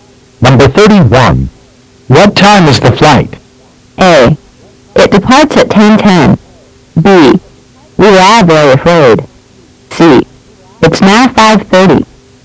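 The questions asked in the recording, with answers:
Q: What time is the flight?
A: A: It departs at 10:10.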